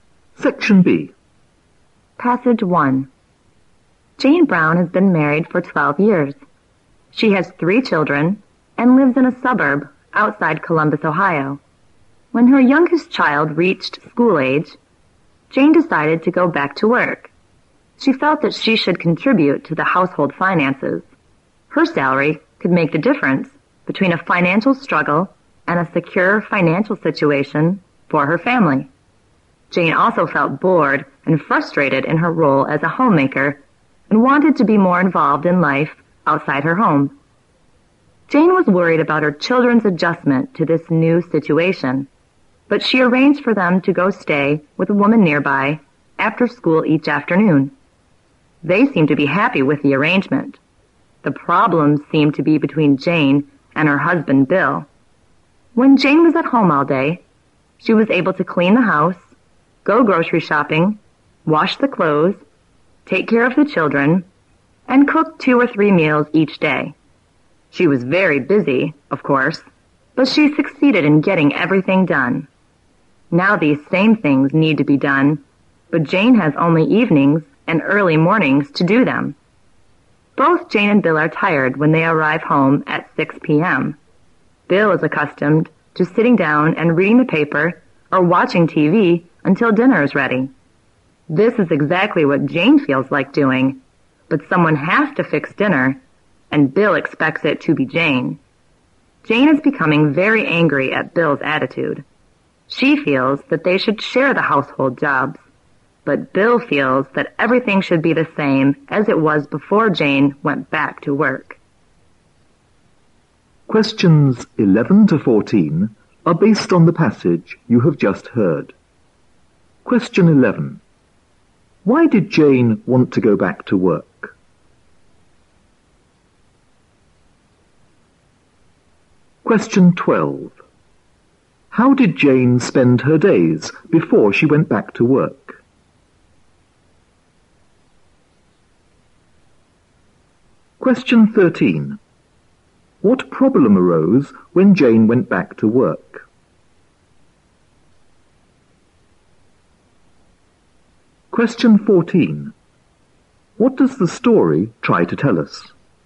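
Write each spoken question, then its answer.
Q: Why did Jane want to go back to work?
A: To contribute to the family finances and be more involved in life outside her home

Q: How did Jane spend her days before she went back to work?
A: Doing the housework and taking care of the children

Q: What problem arose when Jane went back to work?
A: Her husband would not share the housework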